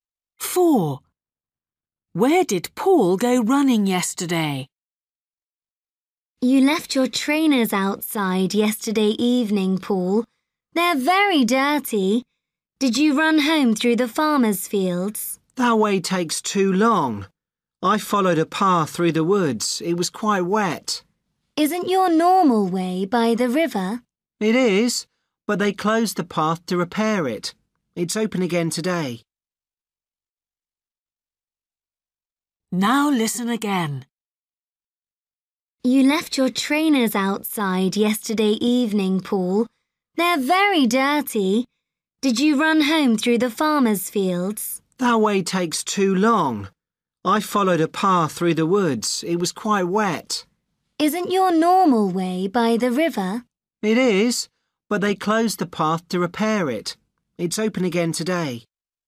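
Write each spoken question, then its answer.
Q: Where did Paul go running yesterday?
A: through the woods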